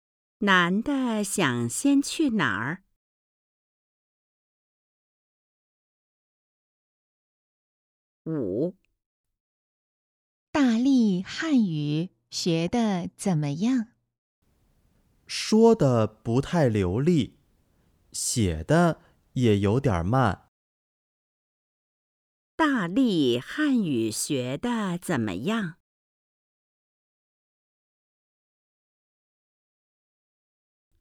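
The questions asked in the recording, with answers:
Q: 大力汉语学得怎么样?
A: 不太好,说得不太流利,写得有点慢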